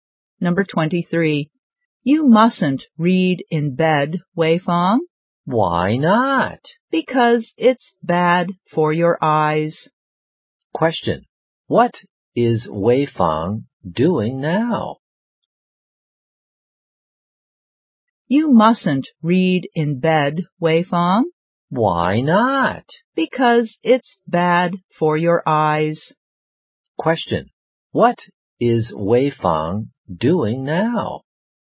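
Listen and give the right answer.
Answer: Reading in bed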